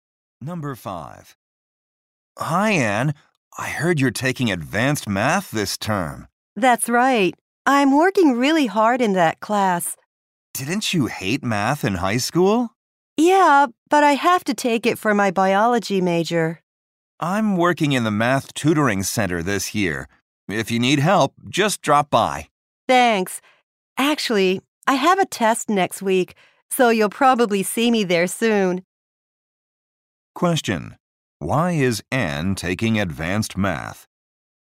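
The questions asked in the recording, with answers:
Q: Why is Anne taking advanced math?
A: It is required for her biology major.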